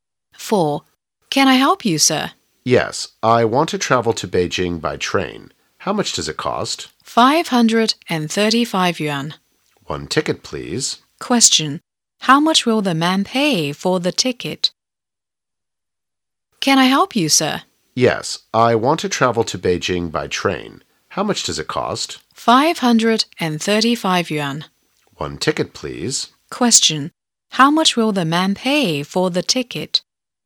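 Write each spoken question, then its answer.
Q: How much will the man pay for the ticket?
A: 535 yuan.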